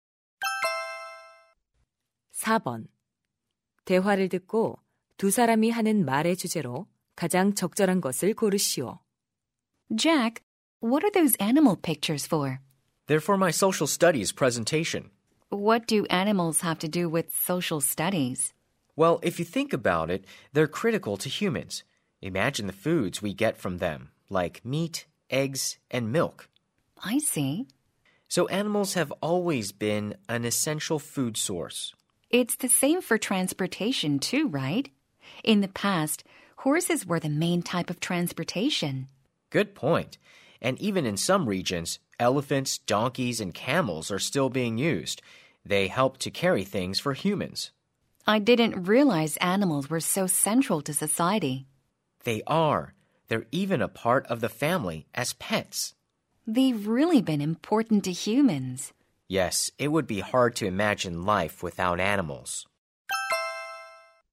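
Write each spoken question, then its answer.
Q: 대화를 듣고 두 사람이 하는 말의 주제로 가장 적절한 것을 고르시오.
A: 인간에게 동물이 중요한 이유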